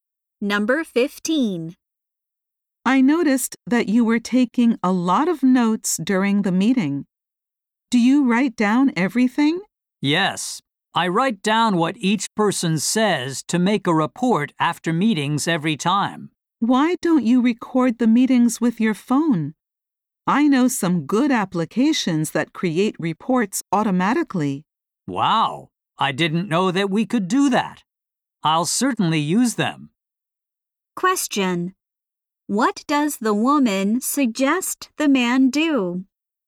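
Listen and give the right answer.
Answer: Record the meetings with his phone.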